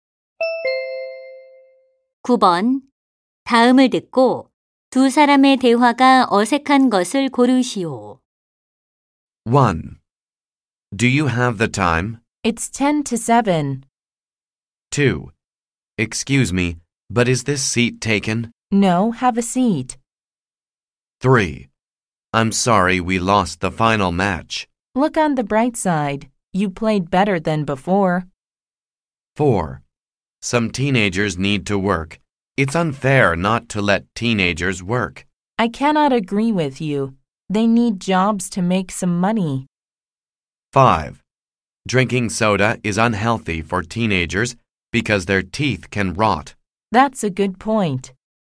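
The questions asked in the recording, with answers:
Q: 다음을 듣고 두 사람의 대화가 어색한 것을 고르시오.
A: 4번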